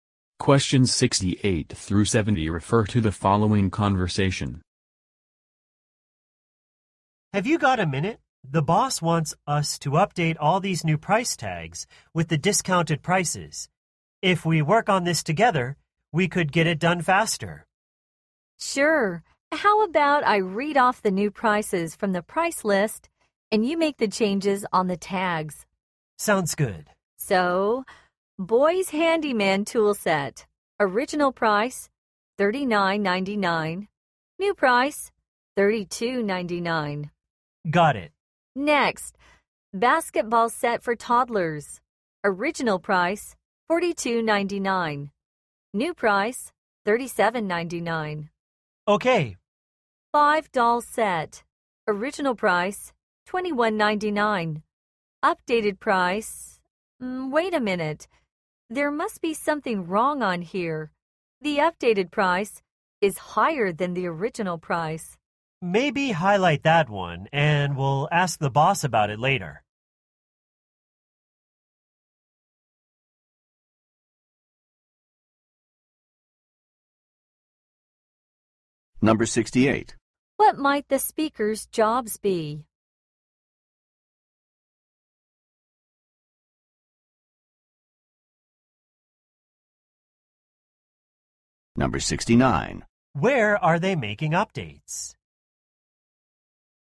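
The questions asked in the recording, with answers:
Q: What might the speaker's jobs be?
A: Store employees

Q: Where are they making updates?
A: On the price tags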